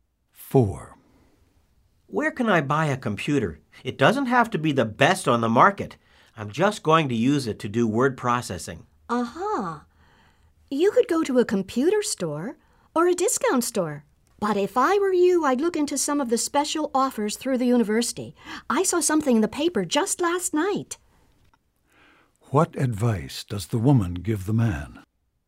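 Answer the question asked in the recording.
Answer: Look into special offers through the university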